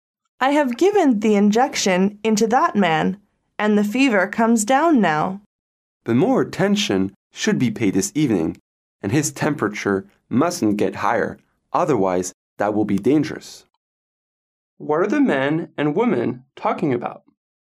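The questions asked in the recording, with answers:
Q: What are the men and women talking about?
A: A patient's condition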